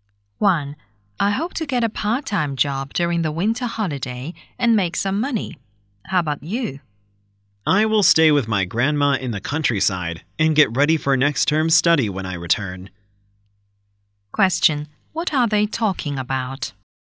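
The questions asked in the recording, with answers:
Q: What are they talking about?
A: Their plans for the winter holiday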